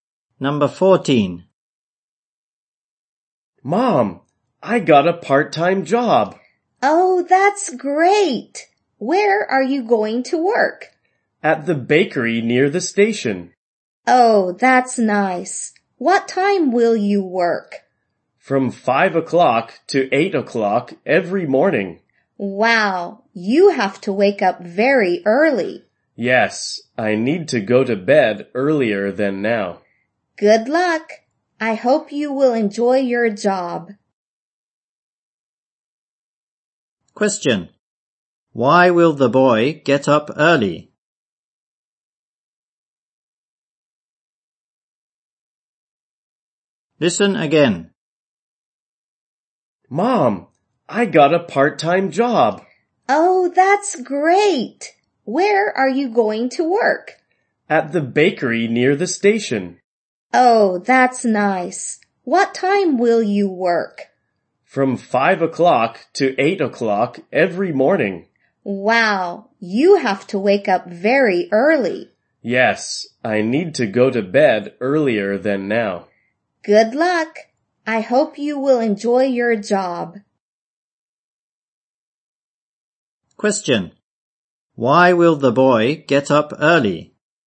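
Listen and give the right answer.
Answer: He will work at a bakery from 5 o'clock every morning.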